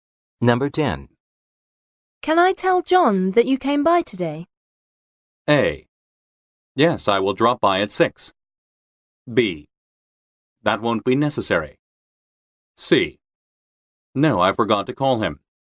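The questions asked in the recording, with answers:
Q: Can I tell John that you came by today?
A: B: That won't be necessary.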